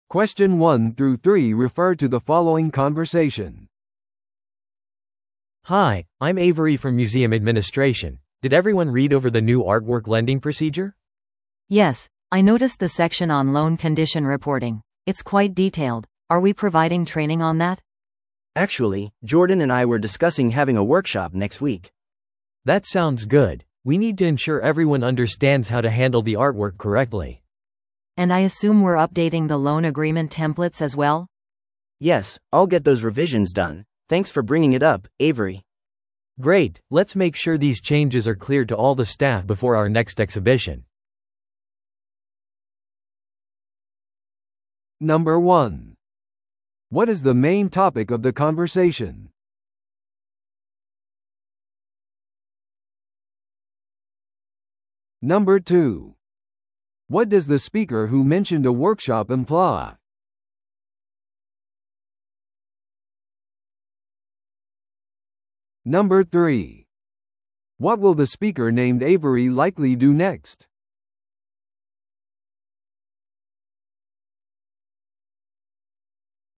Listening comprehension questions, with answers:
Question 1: What is the main topic of the conversation?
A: 新しい作品貸し出し手順についての話し合い。

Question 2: What does the speaker who mentioned a workshop imply?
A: 来週それを実施する計画だ。

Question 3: What will the speaker named Avery likely do next?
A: すべてのスタッフが変更事項を知っているか確認する。

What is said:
A: Hi, I'm Avery from museum administration. Did everyone read over the new artwork lending procedure?
B: Yes, I noticed the section on loan condition reporting. It's quite detailed. Are we providing training on that?
C: Actually, Jordan and I were discussing having a workshop next week.
A: That sounds good. We need to ensure everyone understands how to handle the artwork correctly.
B: And I assume we're updating the loan agreement templates as well?
C: Yes, I'll get those revisions done. Thanks for bringing it up, Avery.
A: Great, let's make sure these changes are clear to all the staff before our next exhibition.